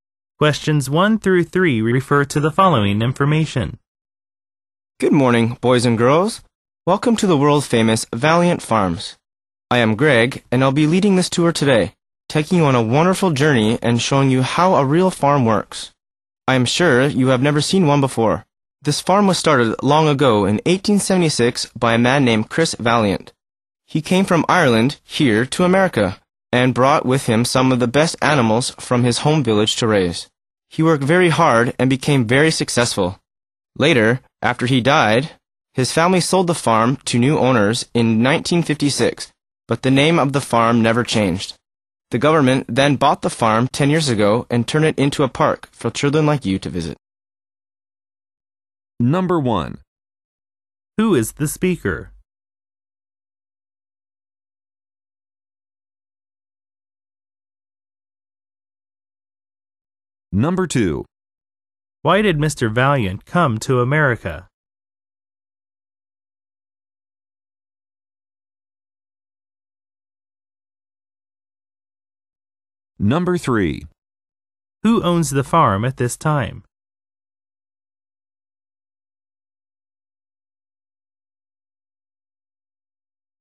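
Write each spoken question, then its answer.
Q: Who is the speaker?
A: Greg, the tour guide at Valiant Farms

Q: Who owns the farm at this time?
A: The government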